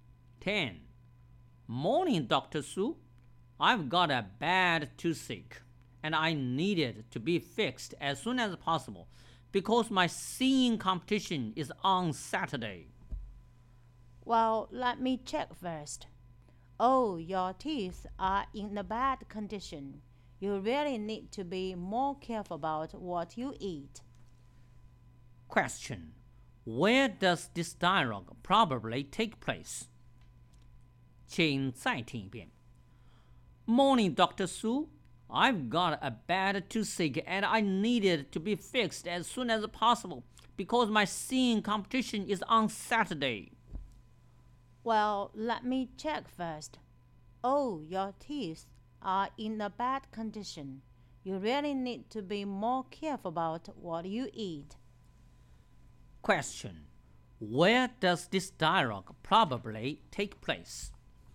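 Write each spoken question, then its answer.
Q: Where does this dialogue probably take place?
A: At a dentist's (clinic)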